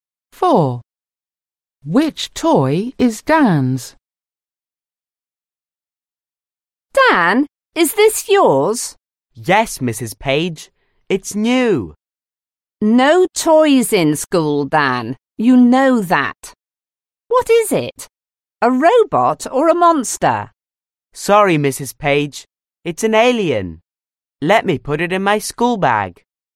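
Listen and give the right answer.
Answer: an alien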